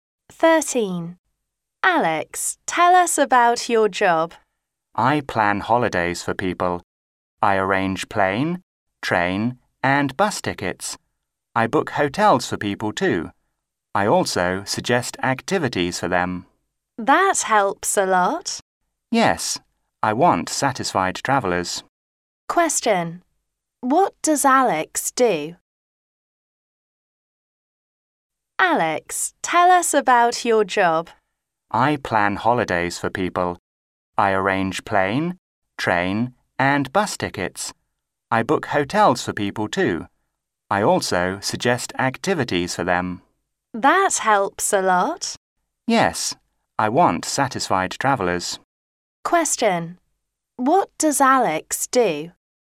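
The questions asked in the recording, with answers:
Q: What does Alex do?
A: He plans holidays for people (travel agent)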